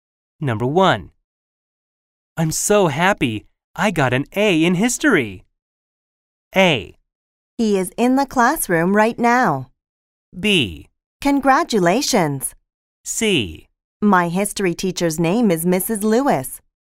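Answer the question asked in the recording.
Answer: B: Congratulations.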